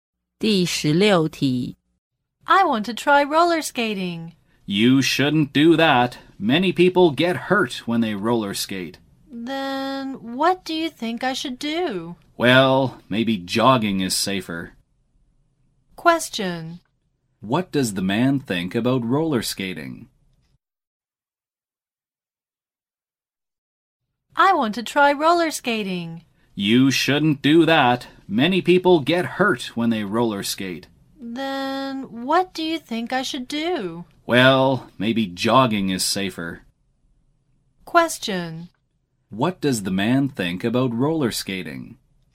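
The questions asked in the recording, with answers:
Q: What does the man think about roller skating?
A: It is dangerous; many people get hurt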